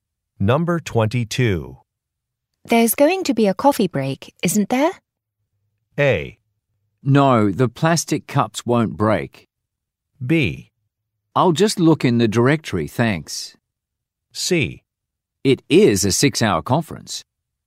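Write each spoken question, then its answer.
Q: There's going to be a coffee break, isn't there?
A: C: It is a 6-hour conference.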